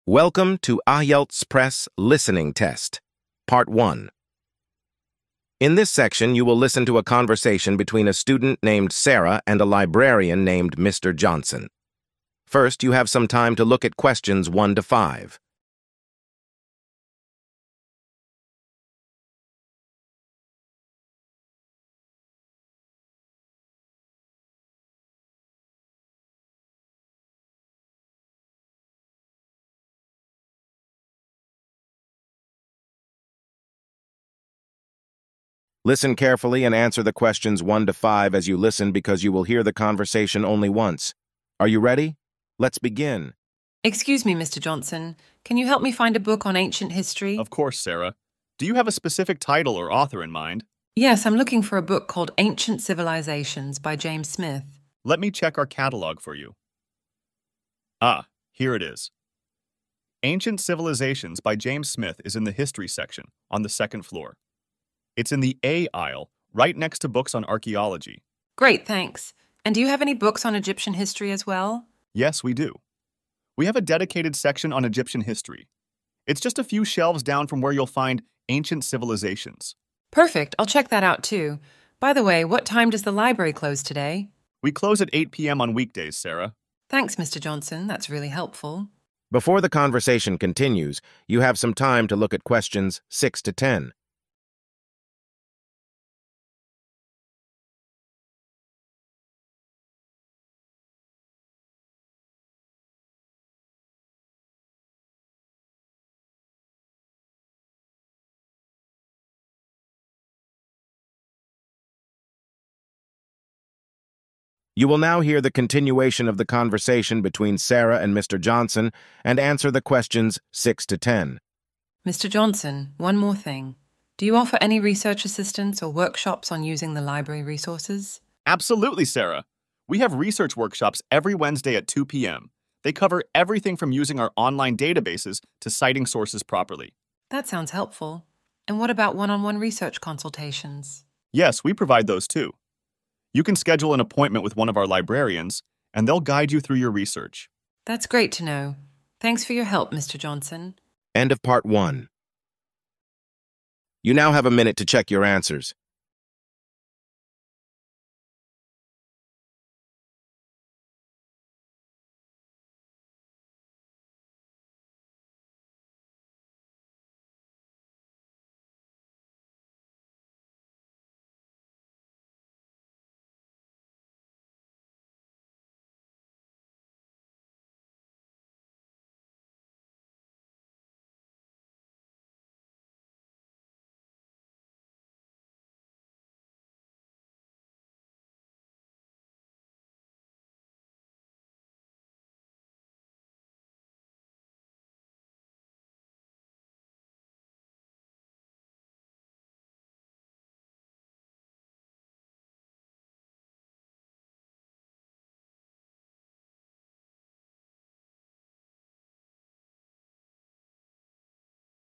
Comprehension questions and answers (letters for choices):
Choose the correct answers A-D and write the answers next to 1- 10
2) What is the title of the book Sarah is looking for?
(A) Ancient Egypt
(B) James Smith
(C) Ancient Civilizations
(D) The History of Archaeology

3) Where is the book "Ancient Civilizations" located?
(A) On the first floor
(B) In the "A" aisle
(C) In the archaeology section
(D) On the top shelf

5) What time does the library close on weekdays?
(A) 6 PM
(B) 7 PM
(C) 8 PM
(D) 9 PM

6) What does Sarah inquire about in Part 2 of the conversation?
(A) Library opening hours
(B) Workshops on ancient history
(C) Research assistance and workshops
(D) Mr. Johnson's favorite book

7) When are the research workshops held?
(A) Every Monday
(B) Every Wednesday at 2 PM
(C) Every Friday at 5 PM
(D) Only on weekends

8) What is mentioned as the content of the research workshops?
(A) Cooking recipes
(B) Proper citing of sources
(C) Fiction literature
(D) Movie reviews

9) How can students access one-on-one research consultations?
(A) By attending workshops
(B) By checking out books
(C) By scheduling an appointment with a librarian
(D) By browsing the library's website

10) How does Sarah respond to Mr. Johnson's information in Part 2?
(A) She thanks him for the information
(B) She leaves without saying anything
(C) She asks for more book recommendations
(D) She complains about the library's services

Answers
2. C
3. B
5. C
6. C
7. B
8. B
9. C
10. A

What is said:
Sarah: Excuse me, Mr. Johnson, can you help me find a book on ancient history?
Mr. Johnson: Of course, Sarah. Do you have a specific title or author in mind?
Sarah: Yes, I'm looking for a book called "Ancient Civilizations" by James Smith.
Mr. Johnson: Let me check our catalog for you. [Pause] Ah, here it is. "Ancient Civilizations" by James Smith is in the history section, on the second floor. It's in the "A" aisle, right next to books on archaeology.
Sarah: Great, thanks! And do you have any books on Egyptian history as well?
Mr. Johnson: Yes, we do. We have a dedicated section on Egyptian history. It's just a few shelves down from where you'll find "Ancient Civilizations."
Sarah: Perfect, I'll check that out too. By the way, what time does the library close today?
Mr. Johnson: We close at 8 PM on weekdays, Sarah.
Sarah: Thanks, Mr. Johnson. That's really helpful.
Sarah: Mr. Johnson, one more thing. Do you offer any research assistance or workshops on using the library resources?
Mr. Johnson: Absolutely, Sarah! We have research workshops every Wednesday at 2 PM. They cover everything from using our online databases to citing sources properly.
Sarah: That sounds helpful. And what about one-on-one research consultations?
Mr. Johnson: Yes, we provide those too. You can schedule an appointment with one of our librarians, and they'll guide you through your research.
Sarah: That's great to know. Thanks for your help, Mr. Johnson.